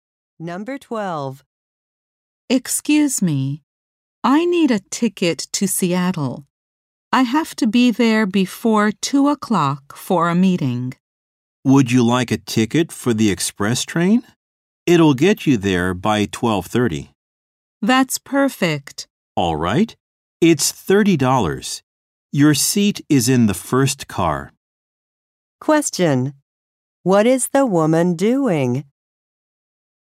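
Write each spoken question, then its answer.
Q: Question: What is the woman doing?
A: Buying a train ticket to Seattle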